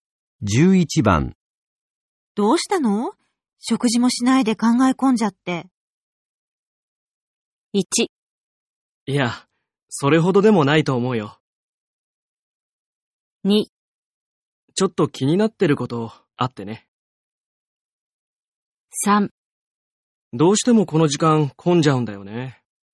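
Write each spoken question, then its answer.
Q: どうしたの?食事もしないで考え込んじゃって。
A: 2: ちょっと気になってることあってね。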